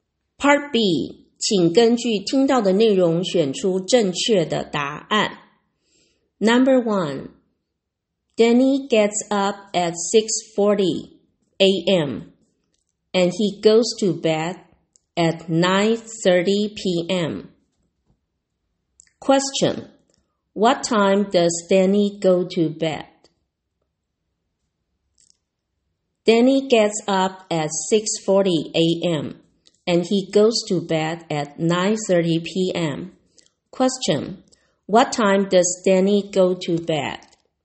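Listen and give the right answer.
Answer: 9:30 p.m.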